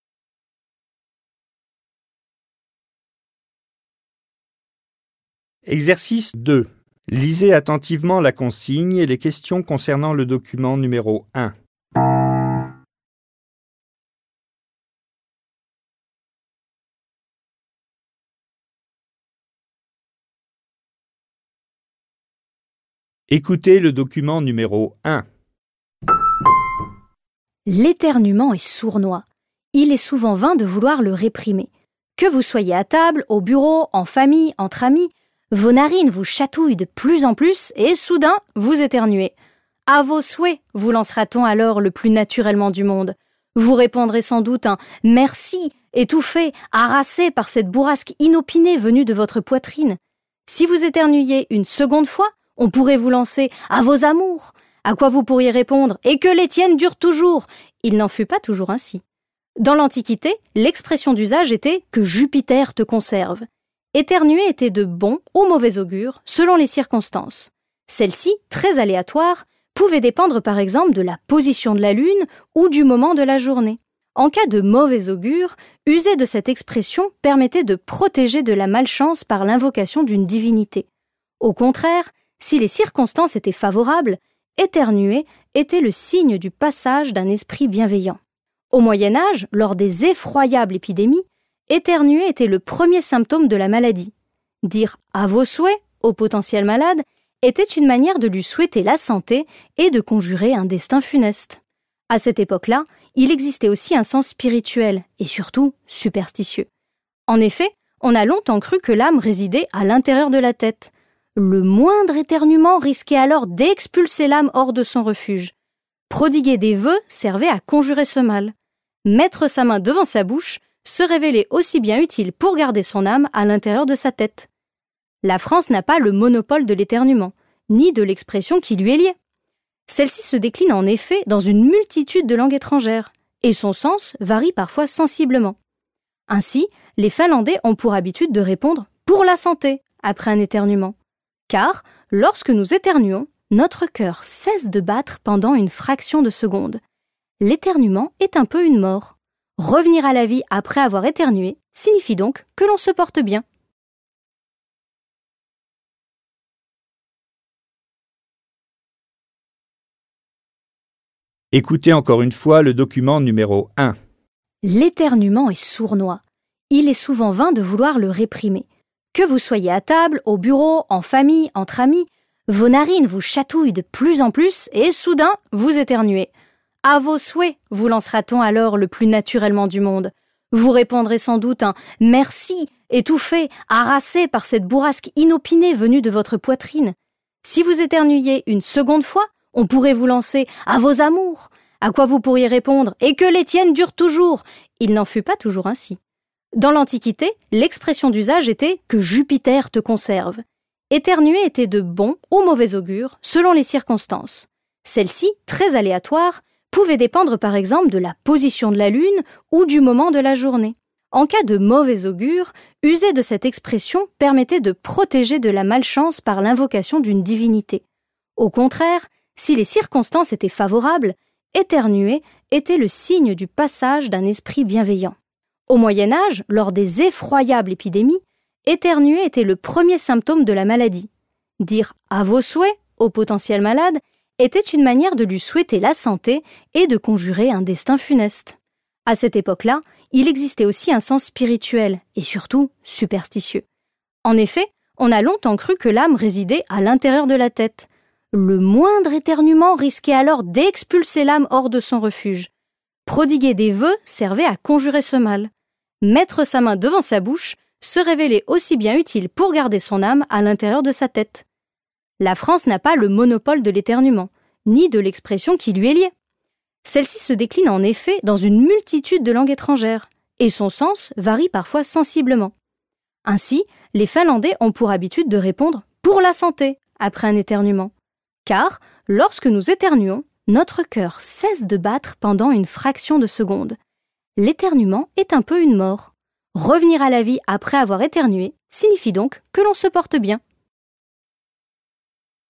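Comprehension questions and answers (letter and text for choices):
Vous allez écouter deux fois deux documents. Choisissez pour chaque phrase 2.1–2.6 la suite qui convient. Cochez la lettre A, B, C ou D correspondant à votre choix. Les phrases 2.1–2.3 se rapportent au document no 1 et les phrases 2.4–2.6 au document no 2.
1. Laquelle des phrases ci-dessous est vraie ?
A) La langue française manque d'expressions liées à l'éternuement.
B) À l'époque des grandes épidémies, on ne réagissait plus à l'éternuement.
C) Au Moyen Âge, mettre la main devant sa bouche servait à protéger les autres.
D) Dans la civilisation antique, l'éternuement était interprété de deux façons différentes.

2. L'éternuement passe pour une mort momentanée car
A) un organe vital s'arrête.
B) il survient de manière inattendue.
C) c'est le premier symptôme d'une maladie.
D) il risque d'expulser l'âme hors de son refuge.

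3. La femme parle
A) d'une coutume sociale.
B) du traitement d'un rhume.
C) d'un faux pas involontaire.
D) de la prévention d'une maladie.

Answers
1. D) Dans la civilisation antique, l'éternuement était interprété de deux façons différentes.
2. A) un organe vital s'arrête.
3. A) d'une coutume sociale.

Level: dwujęzyczny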